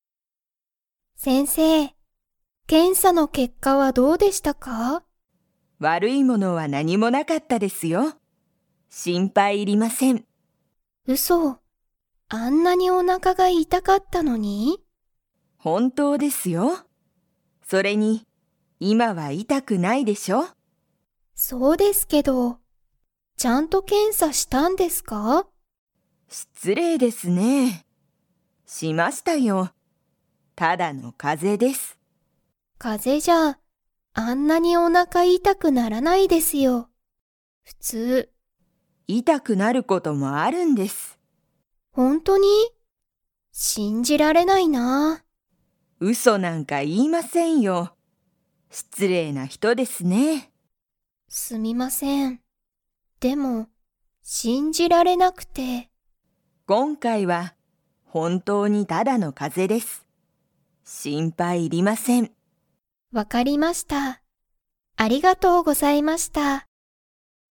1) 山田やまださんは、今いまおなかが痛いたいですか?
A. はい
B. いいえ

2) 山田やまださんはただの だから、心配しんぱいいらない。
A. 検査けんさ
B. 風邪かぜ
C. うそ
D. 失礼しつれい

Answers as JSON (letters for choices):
{"1": "B", "2": "B"}

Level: Level 4